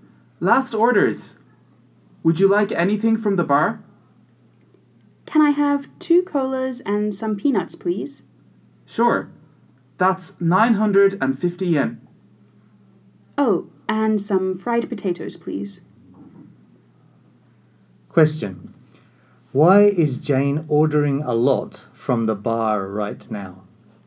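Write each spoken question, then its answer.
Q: Why is Jane ordering a lot from the bar right now?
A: Because it is last orders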